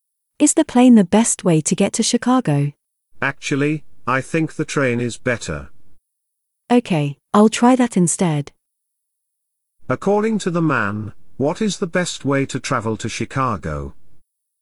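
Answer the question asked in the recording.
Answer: By train.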